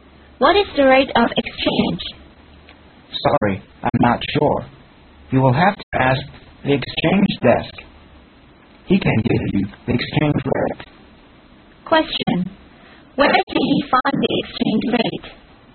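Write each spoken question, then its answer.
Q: Where can he find the exchange rate?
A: At the exchange desk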